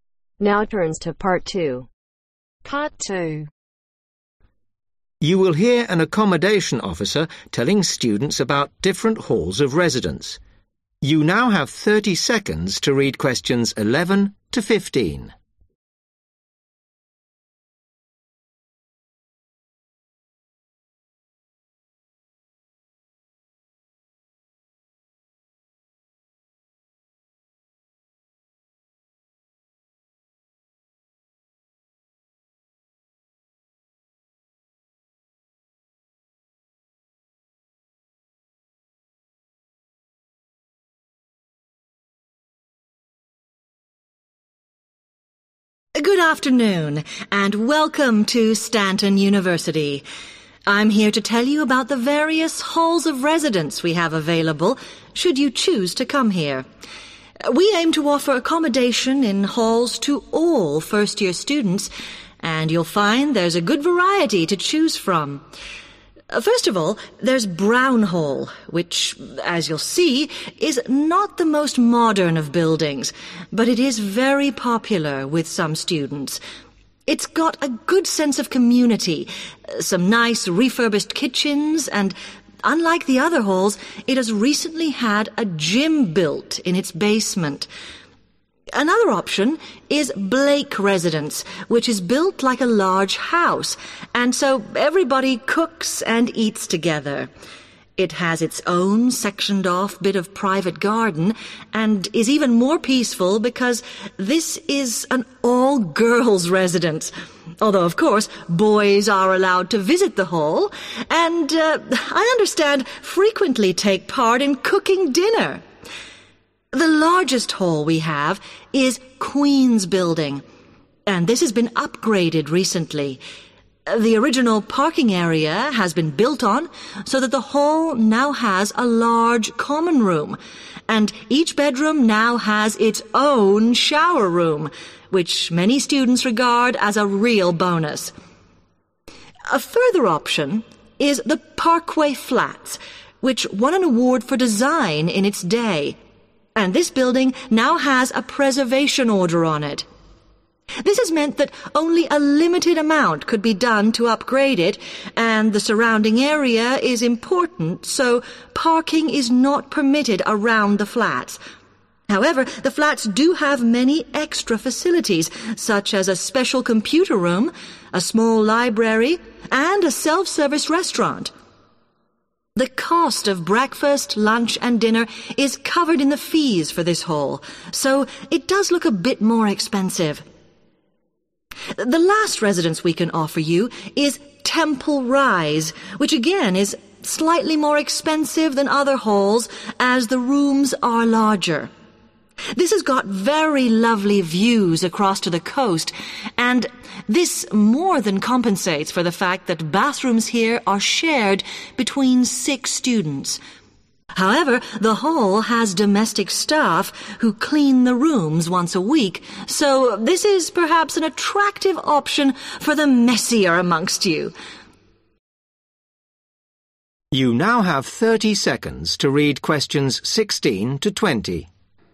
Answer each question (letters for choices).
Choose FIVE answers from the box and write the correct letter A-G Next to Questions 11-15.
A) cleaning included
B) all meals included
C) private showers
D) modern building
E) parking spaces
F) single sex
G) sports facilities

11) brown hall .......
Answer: G

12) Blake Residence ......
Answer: F

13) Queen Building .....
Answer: C

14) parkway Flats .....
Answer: B

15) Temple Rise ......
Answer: A